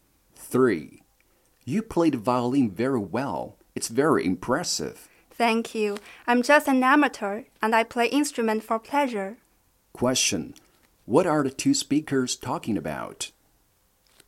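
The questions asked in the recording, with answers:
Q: What are the two speakers talking about?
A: The man's violin playing, which is a hobby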